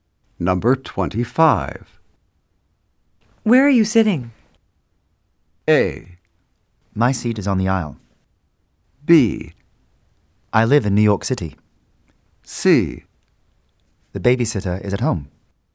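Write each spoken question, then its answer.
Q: Where are you sitting?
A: A: My seat is on the aisle.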